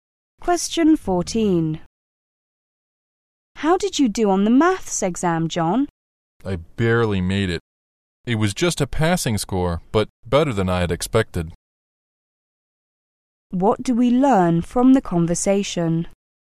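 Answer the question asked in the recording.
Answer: John barely passed the maths exam, but did better than he had expected.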